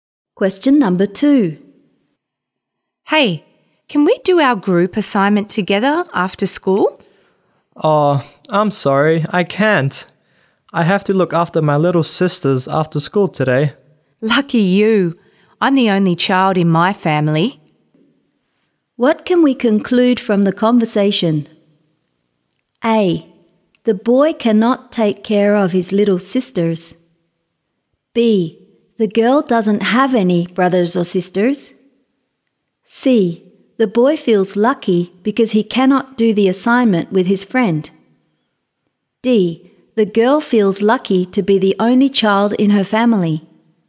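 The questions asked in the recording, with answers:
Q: What can we conclude from the conversation?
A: B: The girl doesn't have any brothers or sisters.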